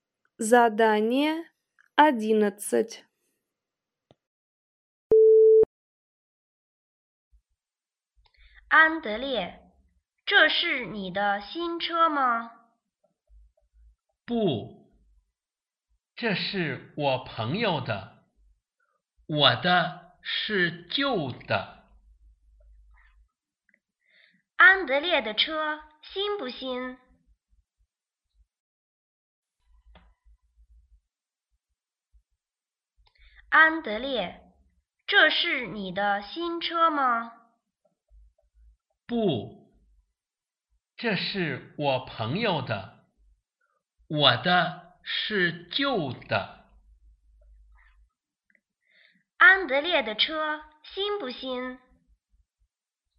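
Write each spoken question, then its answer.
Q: 安德烈的车新不新?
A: 不新,是旧的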